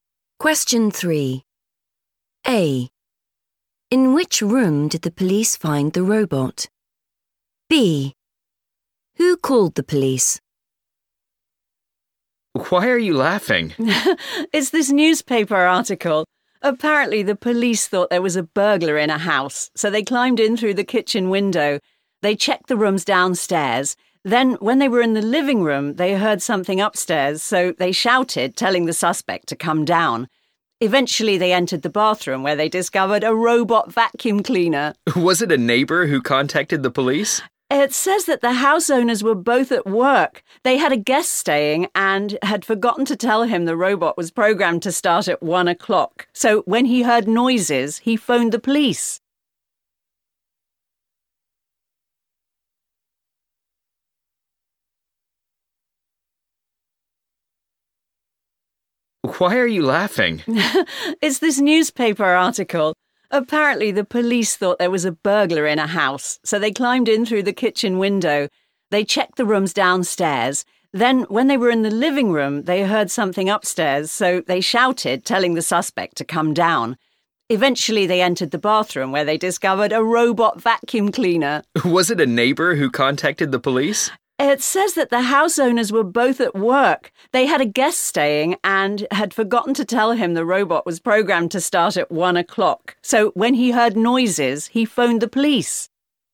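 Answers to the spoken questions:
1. the bathroom
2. a guest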